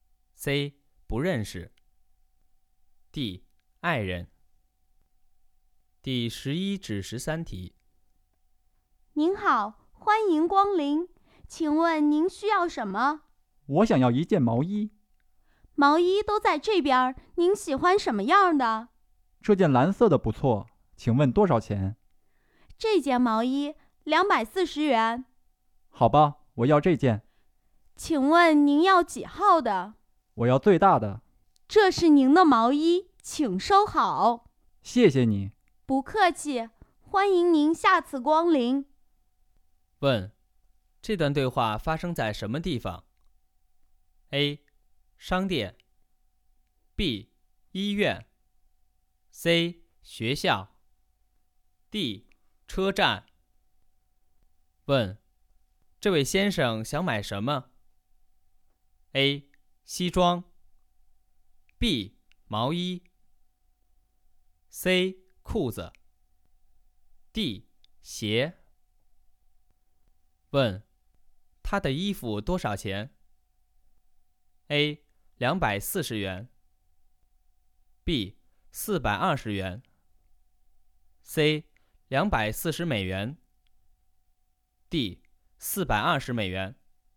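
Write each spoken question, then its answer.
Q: 问,这段对话发生在什么地方?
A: A: 商店

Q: 问,这位先生想买什么?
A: B: 毛衣

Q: 问,他的衣服多少钱?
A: A: 240元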